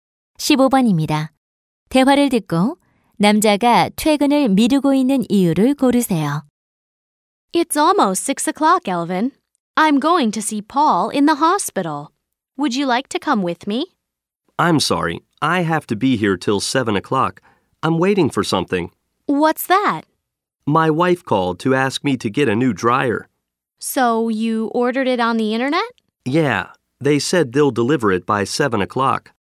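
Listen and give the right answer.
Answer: 주문한 건조기 배달을 기다려서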